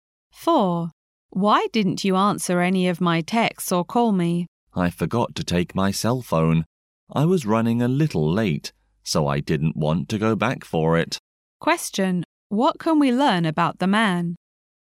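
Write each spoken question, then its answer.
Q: What can we learn about the man?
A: He left his cell phone at home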